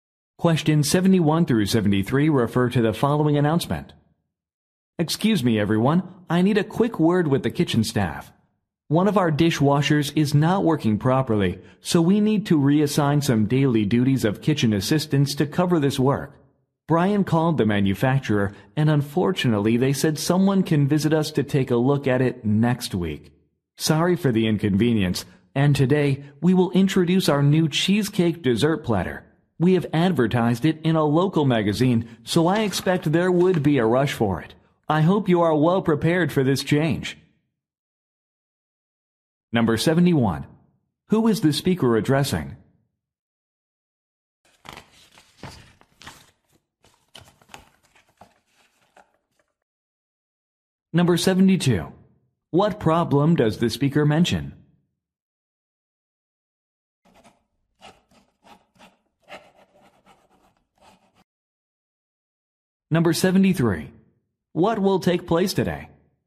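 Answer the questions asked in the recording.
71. The kitchen staff
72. A dishwasher is not working properly
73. A new cheesecake dessert platter will be introduced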